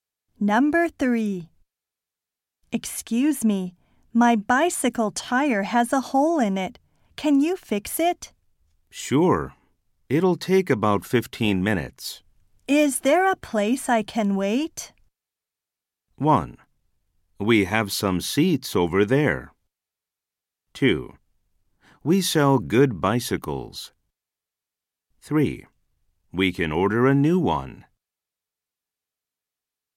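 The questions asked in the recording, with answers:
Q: Is there a place I can wait?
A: 1: We have some seats over there.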